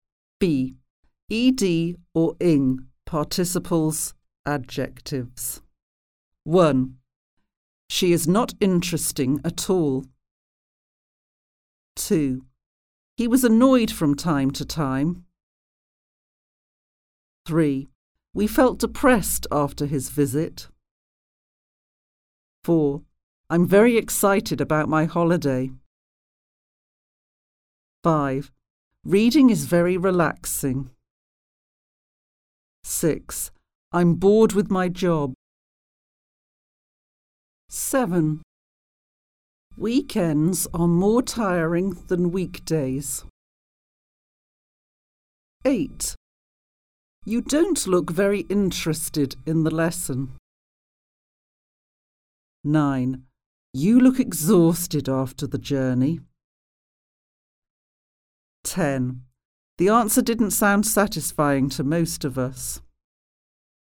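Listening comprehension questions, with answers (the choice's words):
1. -ed or -ing participles / adjectives?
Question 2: She is not (interested interesting) at all.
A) interested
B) interesting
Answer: interesting

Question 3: He was (annoyed annoying) from time to time.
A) annoyed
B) annoying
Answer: annoyed

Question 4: We felt (depressed / depressing) after his visit.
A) depressed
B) depressing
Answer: depressed

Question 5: I'm very (excited / exciting) about my holiday.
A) excited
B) exciting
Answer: excited

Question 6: Reading is very (relaxed / relaxing).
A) relaxed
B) relaxing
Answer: relaxing

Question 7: I'm (bored/ boring) with my job.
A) bored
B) boring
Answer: bored

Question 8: Weekends are more (tired / tiring) than weekdays.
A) tired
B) tiring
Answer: tiring

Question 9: You don't look very (interested / interesting) in the lesson.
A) interested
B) interesting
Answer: interested

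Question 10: You look (exhausted / exhausting) after the journey.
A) exhausted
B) exhausting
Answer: exhausted

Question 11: The answer didn't sound (satisfied / satisfying) to most of us.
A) satisfied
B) satisfying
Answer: satisfying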